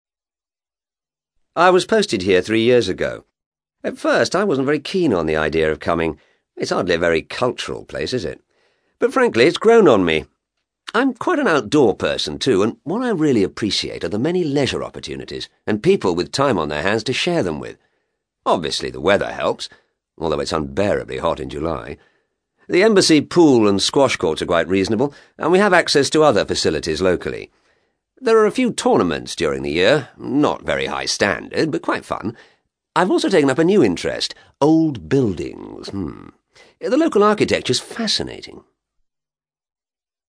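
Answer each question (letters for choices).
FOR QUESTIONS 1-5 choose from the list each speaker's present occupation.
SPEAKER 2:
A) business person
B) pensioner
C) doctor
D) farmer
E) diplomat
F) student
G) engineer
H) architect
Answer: E

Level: CAE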